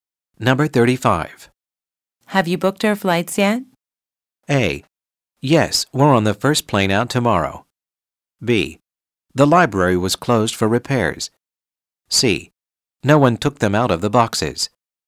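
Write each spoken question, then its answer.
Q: Have you booked our flights yet?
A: A: Yes, we're on the first plane out tomorrow.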